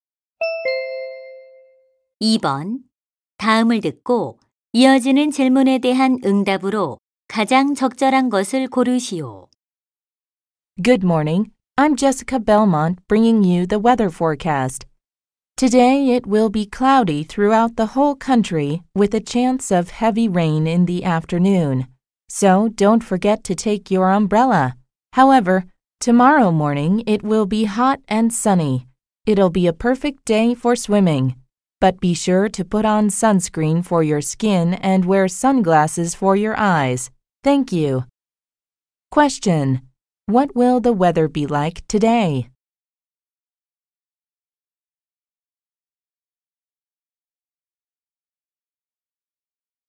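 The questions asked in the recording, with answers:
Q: What will the weather be like today?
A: Cloudy, with a chance of heavy rain in the afternoon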